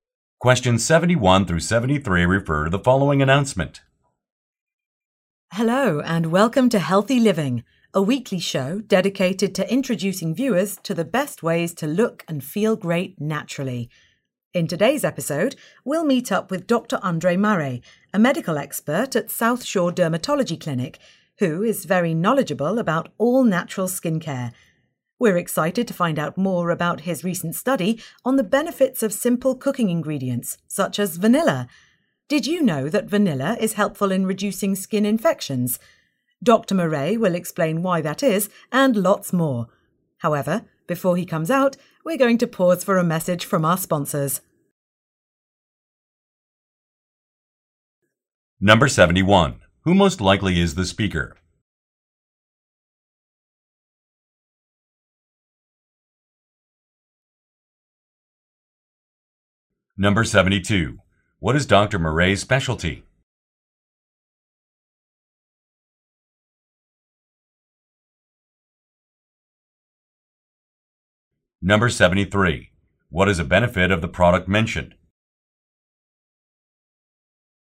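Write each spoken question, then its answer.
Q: Who most likely is the speaker?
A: A TV show host

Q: What is Dr. Murray's specialty?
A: Natural skincare (dermatology)

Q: What is a benefit of the product mentioned?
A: It helps reduce skin infections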